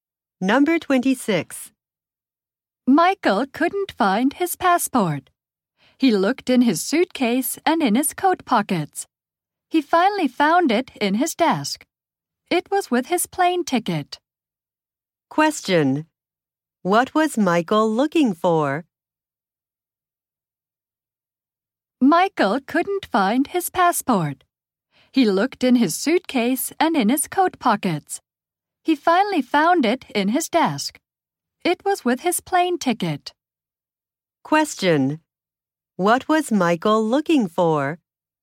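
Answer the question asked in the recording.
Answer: His passport.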